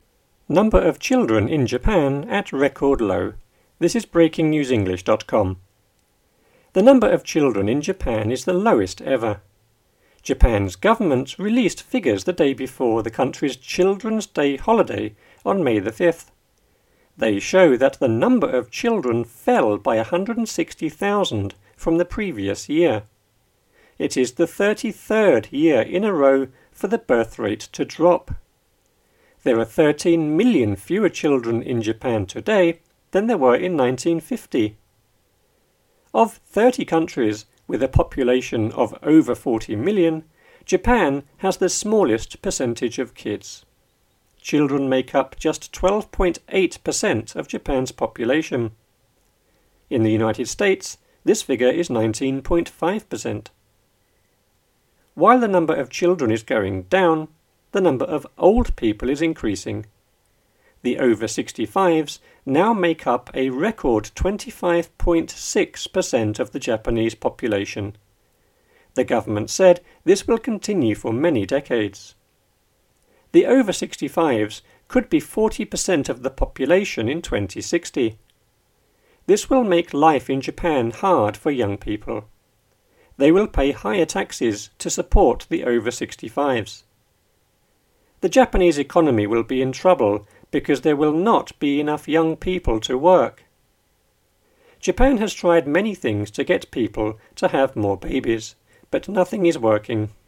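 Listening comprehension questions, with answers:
Listen and choose the correct word in the grey box with the "up / down" arrows.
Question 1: The number of in Japan is the lowest ever.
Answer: children

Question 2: Japan's government released the day before the country's Children's Day on May the 5th.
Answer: figures / holiday

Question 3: They show that the number of children fell by 160,000 from the year.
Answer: previous

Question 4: It is the 33rd year in a for the birth to drop.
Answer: row / rate

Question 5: There are 13 million children in Japan today than there were in 1950.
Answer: fewer

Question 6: Of 30 countries with a of over 40 million, Japan has the smallest of kids.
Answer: population / percentage

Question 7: In the United States, this is 19.5 per cent.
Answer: figure

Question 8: While the of children is going down, the of old people is increasing.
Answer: number / number

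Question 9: The over-65s now make up a 25.6 per cent of the Japanese population.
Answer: record

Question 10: The government said this will continue for many .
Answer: decades

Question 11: This will make in Japan hard for young people.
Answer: life

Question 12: They will pay taxes to support the -65s.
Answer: higher / over

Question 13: The Japanese economy will be in because there will not be enough young people to work.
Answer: trouble

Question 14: Japan has tried many to get people to have more babies, but is working.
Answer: things / nothing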